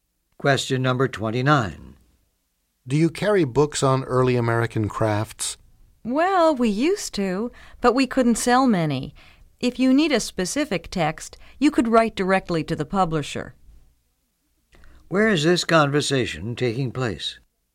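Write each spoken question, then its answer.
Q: Where is this conversation taking place?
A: In a bookstore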